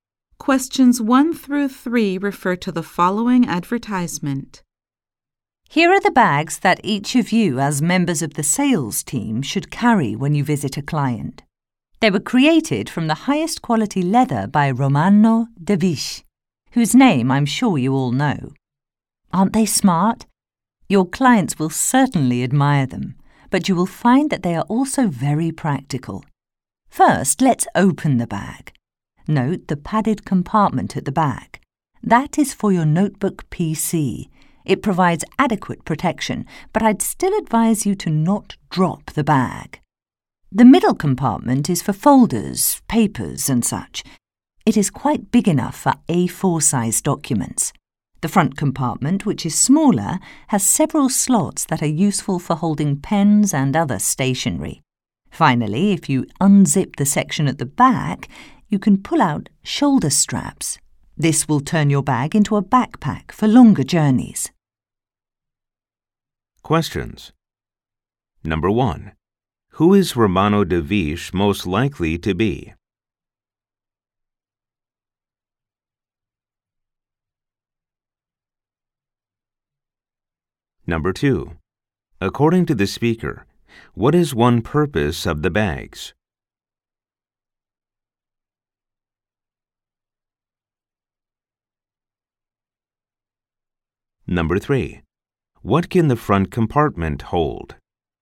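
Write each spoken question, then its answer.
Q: Who is Romano De Viche most likely to be?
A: A well-known bag/leather designer

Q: What can the front compartment hold?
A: Pens and other stationery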